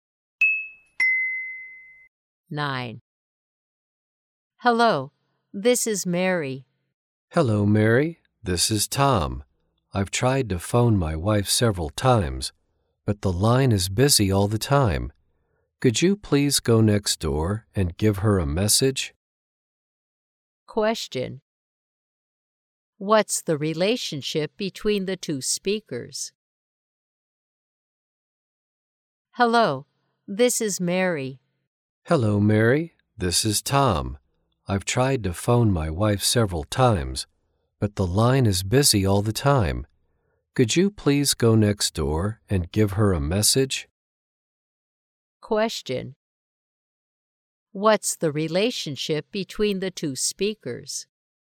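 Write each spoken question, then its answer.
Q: What's the relationship between the two speakers?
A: Neighbours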